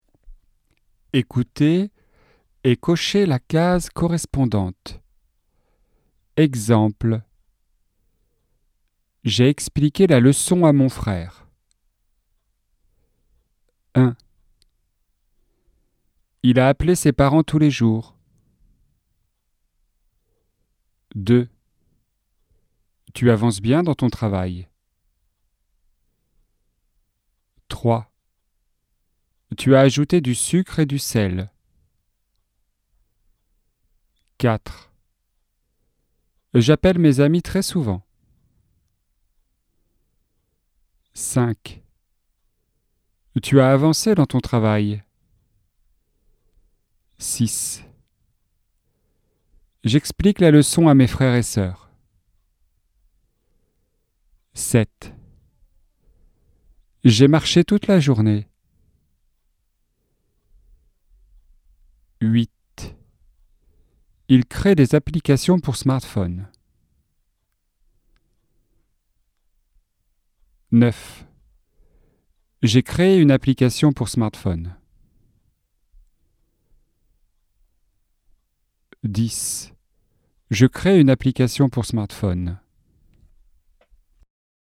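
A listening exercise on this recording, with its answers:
Écoutez et cochez la case correspondante.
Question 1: Il a appelé ses parents tous les jours.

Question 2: Tu avances bien dans ton travail.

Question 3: Tu as ajouté du sucre et du sel.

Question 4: J'appelle mes amis très souvent.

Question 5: Tu as avancé dans ton travail.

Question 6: J'explique la leçon à mes frères et soeurs.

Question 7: J'ai marché toute la journée.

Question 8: Il crée des applications pour smartphone.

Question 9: J'ai crée une application pour smartphone.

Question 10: Je crée une application pour smartphone.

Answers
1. passé
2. présent
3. passé
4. présent
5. passé
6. présent
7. passé
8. présent
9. passé
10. présent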